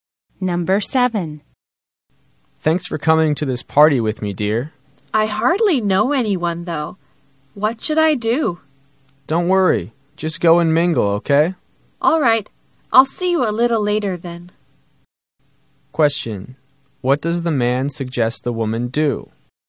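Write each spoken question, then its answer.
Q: What does the man suggest the woman do?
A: Go and mingle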